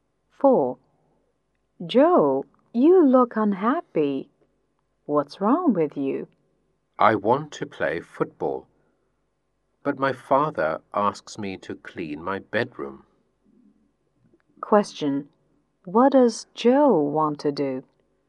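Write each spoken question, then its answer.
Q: What does Joe want to do?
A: Play football.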